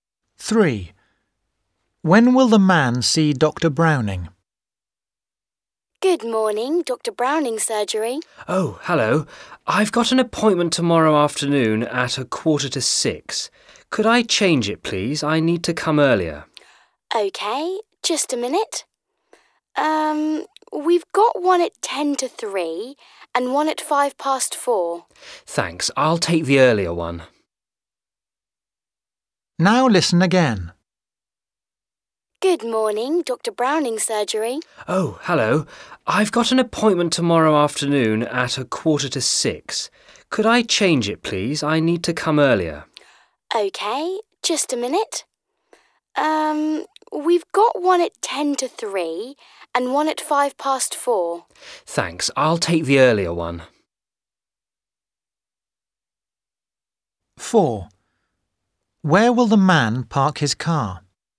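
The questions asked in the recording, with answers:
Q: When will the man see Dr. Browning?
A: at 2:50 tomorrow afternoon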